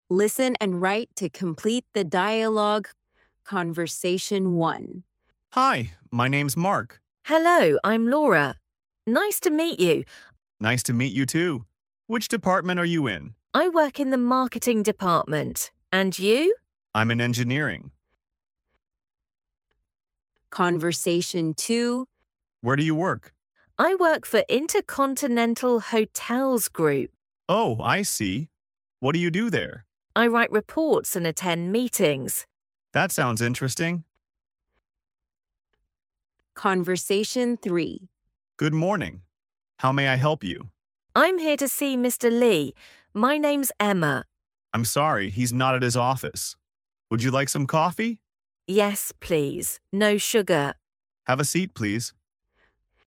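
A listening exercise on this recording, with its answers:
Task 1: Listen and write to complete the dialogue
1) Nice to meet you too. (1) are you in?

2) I'm in (2) .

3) A: (3) ?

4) Oh, I see. (4) there?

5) Good morning. (5) ?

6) A: (6) !.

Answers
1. Which department
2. engineering
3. Where do you work
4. What do you do
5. How may I help you
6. Have a seat, please

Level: A1&A1+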